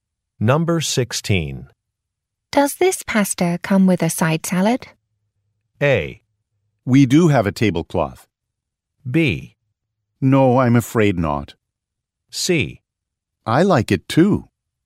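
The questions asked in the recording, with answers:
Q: Does this pasta come with a side salad?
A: B: No, I'm afraid not.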